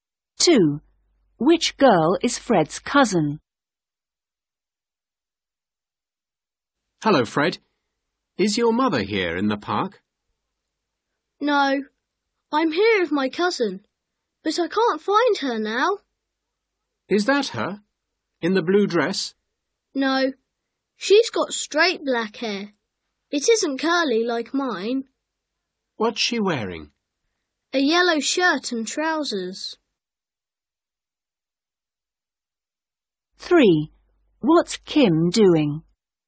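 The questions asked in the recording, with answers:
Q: Which girl is Fred's cousin?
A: the girl with straight black hair in a yellow shirt and trousers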